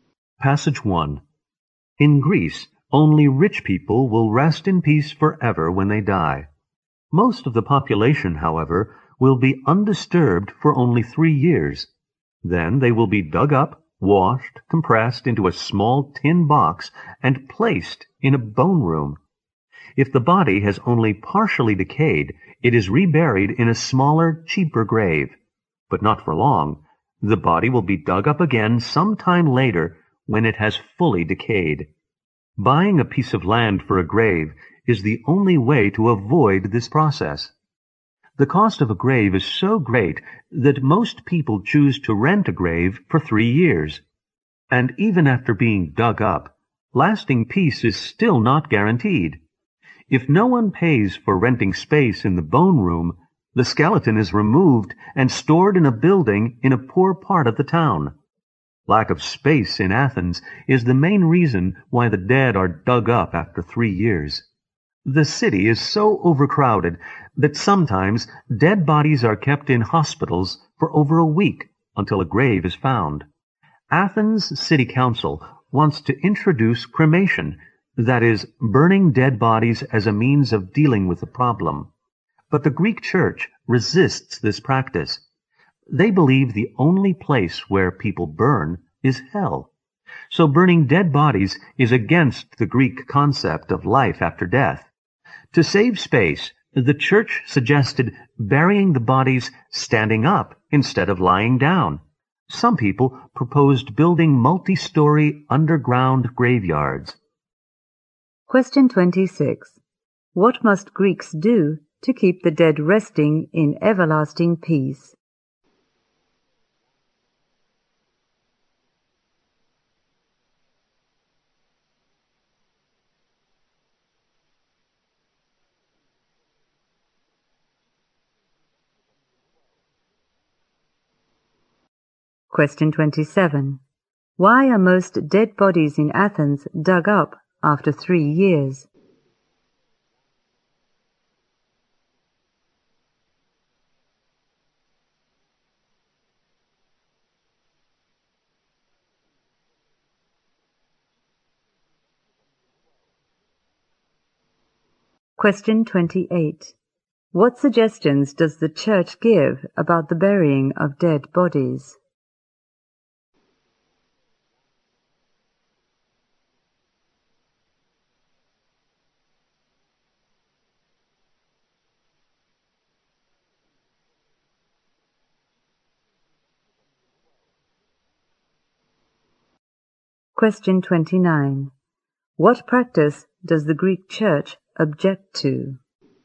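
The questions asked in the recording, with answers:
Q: What must Greeks do to keep the dead resting in everlasting peace?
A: Buy a piece of land for a grave

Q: Why are most dead bodies in Athens dug up after 3 years?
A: There is a lack of space in Athens.

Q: What suggestions does the church give about the burying of dead bodies?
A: Bury them standing up

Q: What practice does the Greek church object to?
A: Cremation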